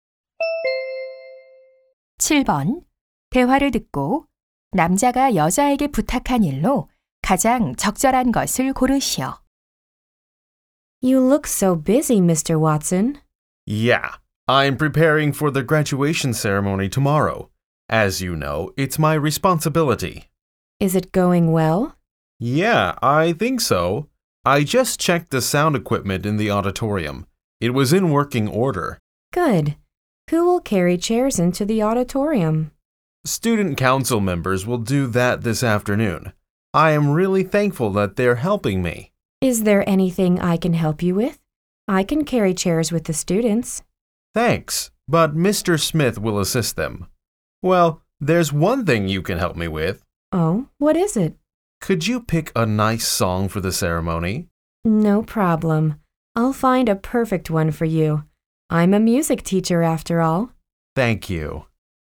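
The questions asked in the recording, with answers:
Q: 대화를 듣고 남자가 여자에게 부탁한 일로 가장 적절한 것을 고르시오.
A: 졸업식에 쓸 노래 고르기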